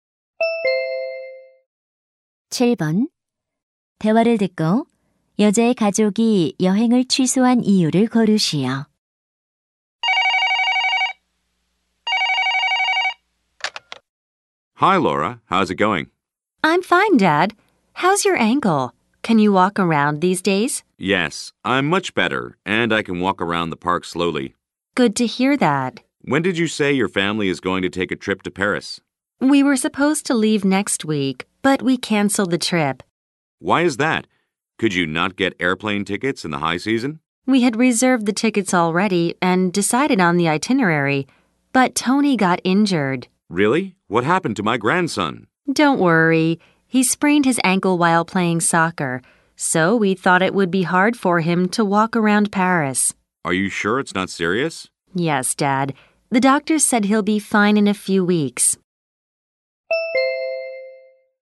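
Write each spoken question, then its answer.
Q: 대화를 듣고 여자의 가족이 여행을 취소한 이유를 고르시오.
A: 아들 Tony가 축구를 하다 발목을 삐어서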